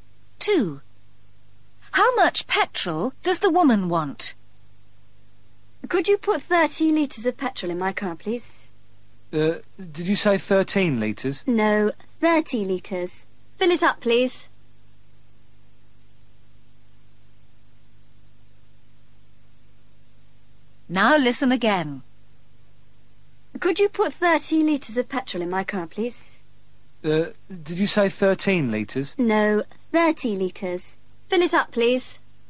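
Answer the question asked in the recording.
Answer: 30 litres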